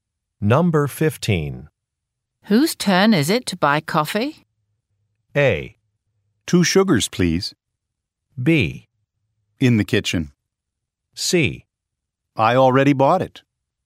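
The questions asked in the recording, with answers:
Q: Whose turn is it to buy coffee?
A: C: I already bought it.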